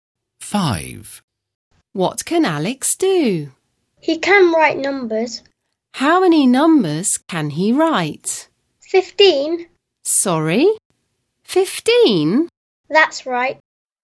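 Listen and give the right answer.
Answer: 15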